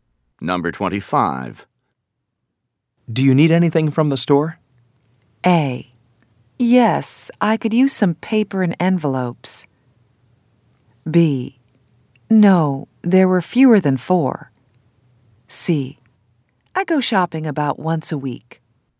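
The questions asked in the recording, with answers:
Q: Do you need anything from the store?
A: A: Yes, I could use some paper and envelopes.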